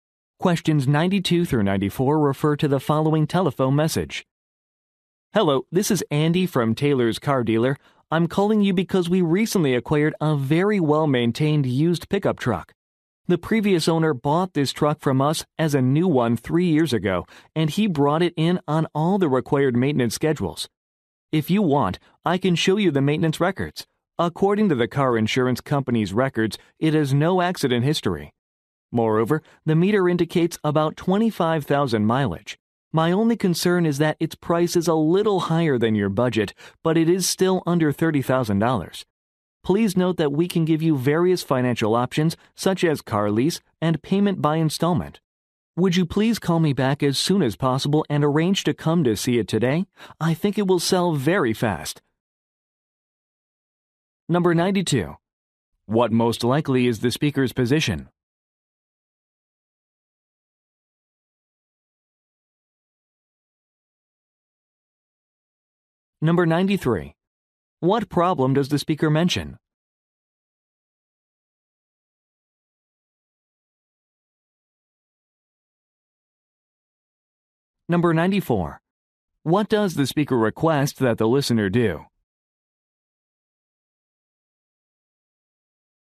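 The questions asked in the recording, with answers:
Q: What most likely is the speaker's position?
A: A car salesperson

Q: What problem does the speaker mention?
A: The price is a little over the listener's budget

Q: What does the speaker request that the listener do?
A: Call back and come to see the truck today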